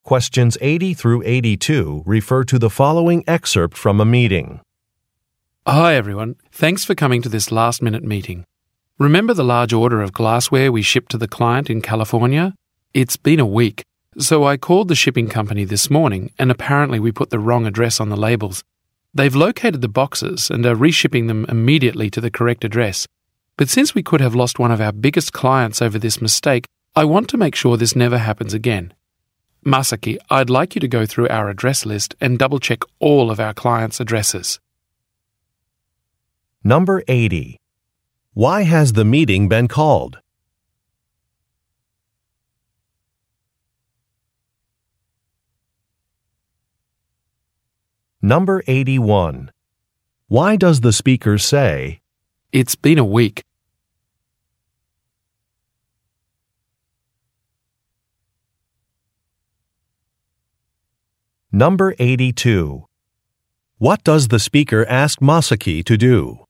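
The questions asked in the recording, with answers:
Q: Why has the meeting been called?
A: To discuss a shipping mistake (wrong address on an order)

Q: Why does the speaker say, "It's been a week"?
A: To explain that the shipment was late and hadn't arrived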